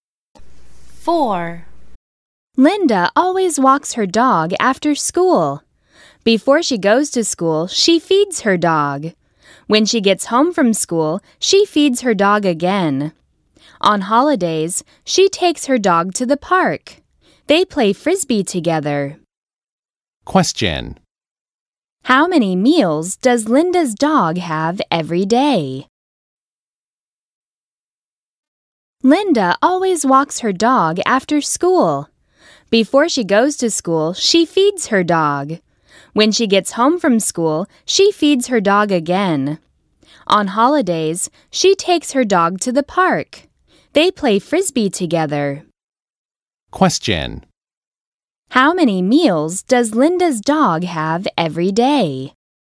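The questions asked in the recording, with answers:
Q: How many meals does Linda's dog have every day?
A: Two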